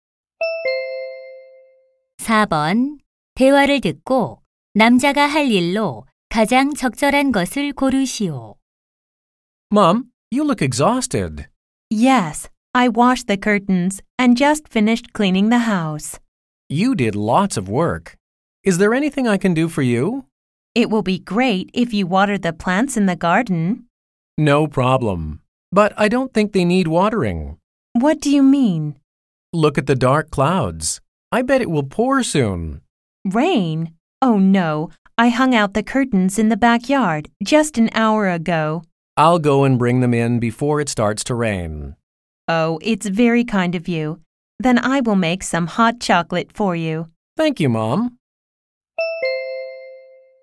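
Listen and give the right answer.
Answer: 뒷마당에 널어 둔 커튼 걷어 오기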